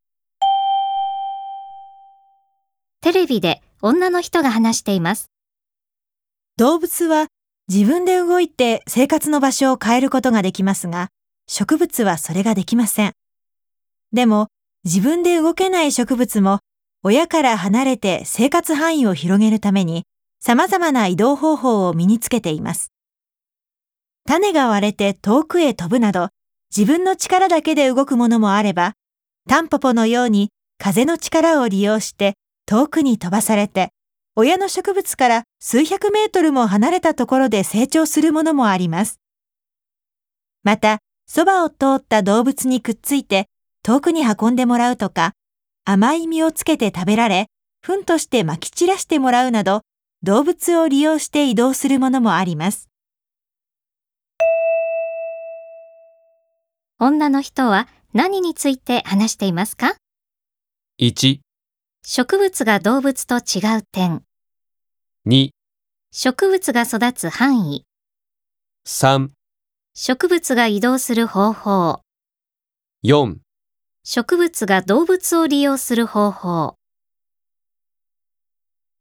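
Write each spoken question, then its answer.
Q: 女の人は何について話していますか?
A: 3: 植物が移動する方法。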